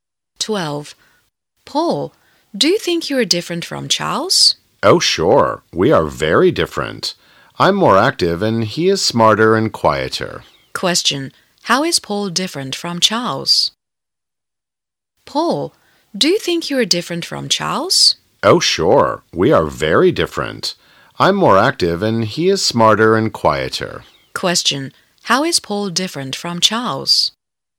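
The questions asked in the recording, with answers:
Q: Question, how is Paul different from Charles?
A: Paul is more active; Charles is smarter and quieter.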